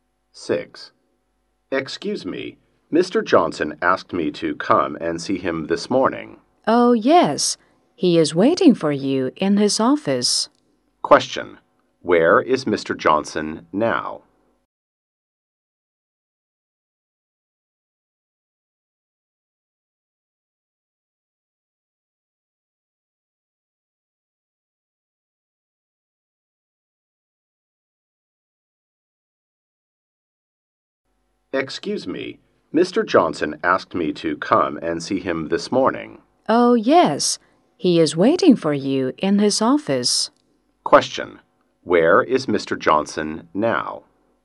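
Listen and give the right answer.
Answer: In his office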